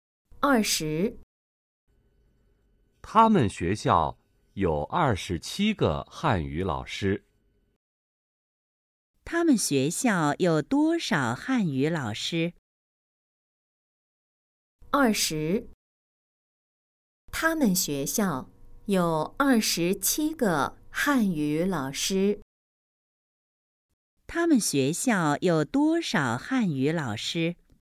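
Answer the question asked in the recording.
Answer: 27个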